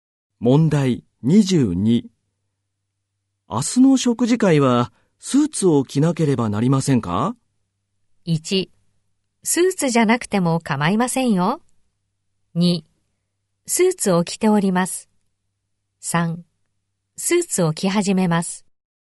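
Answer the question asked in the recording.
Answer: 1: スーツじゃなくても構いませんよ。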